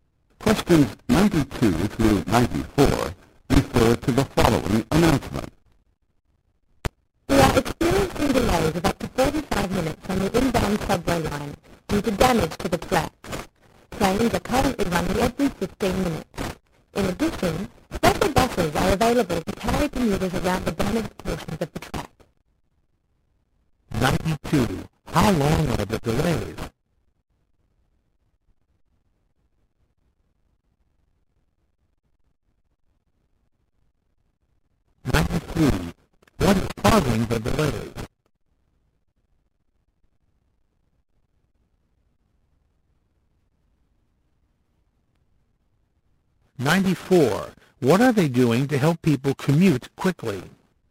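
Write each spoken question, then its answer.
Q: How long are the delays?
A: Up to 45 minutes

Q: What is causing the delays?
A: Damage to the tracks

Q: What are they doing to help people commute quickly?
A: Providing special buses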